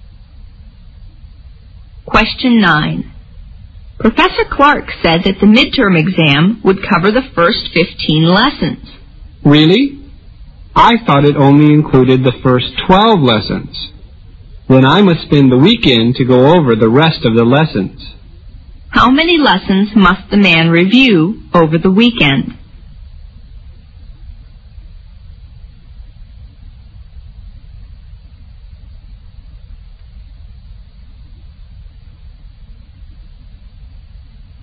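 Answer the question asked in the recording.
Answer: 3 lessons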